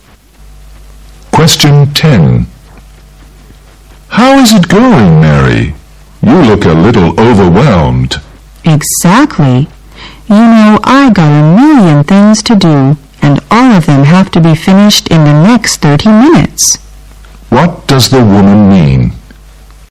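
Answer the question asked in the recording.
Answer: She is very busy, with many things to finish in 30 minutes.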